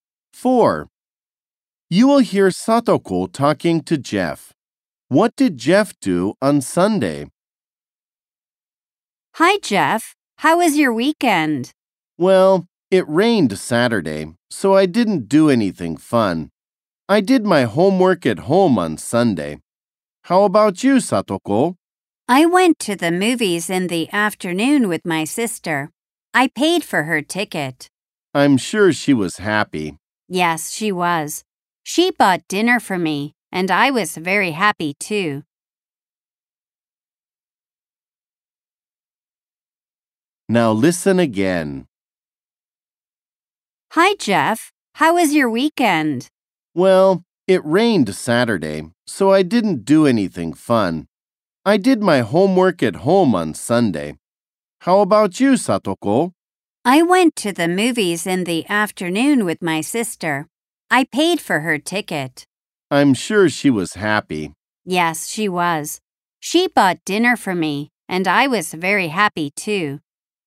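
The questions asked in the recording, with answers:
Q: What did Jeff do on Sunday?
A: He did his homework at home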